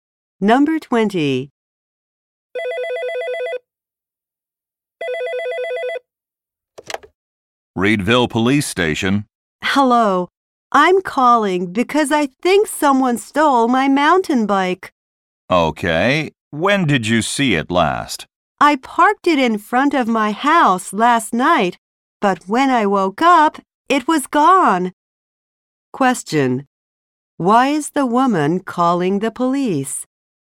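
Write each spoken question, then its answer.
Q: Why is the woman calling the police?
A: Her mountain bike was stolen.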